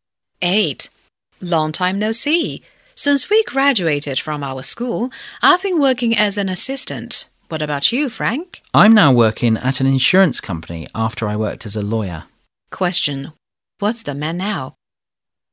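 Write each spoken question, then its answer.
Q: Question. What's the man now?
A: He works at an insurance company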